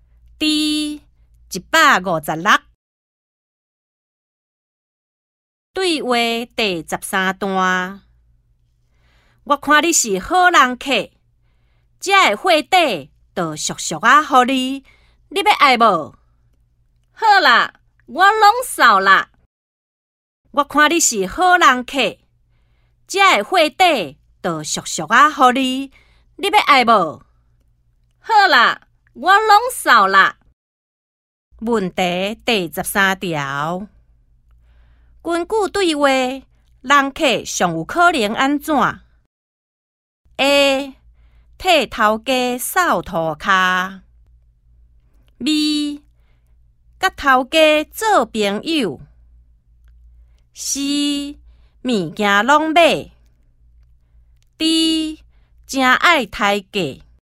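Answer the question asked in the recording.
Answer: C: 物件拢买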